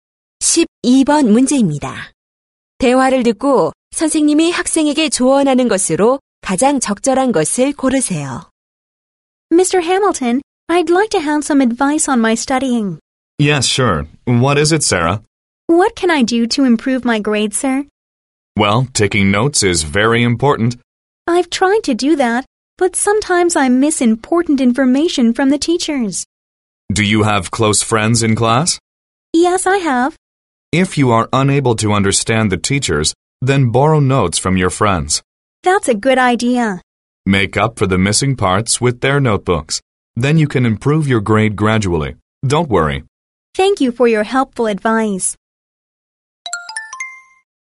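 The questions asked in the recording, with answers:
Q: 대화를 듣고 선생님이 학생에게 조언하는 것으로 가장 적절한 것을 고르세요.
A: 친구의 노트를 빌려 빠진 부분을 보충하라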